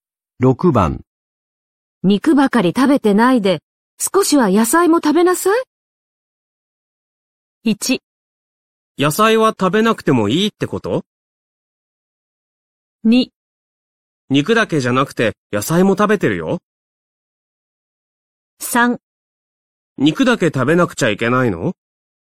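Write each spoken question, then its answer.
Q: 肉ばかり食べてないで、少しは野菜も食べなさい。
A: 2: 肉だけじゃなくて野菜も食べてるよ。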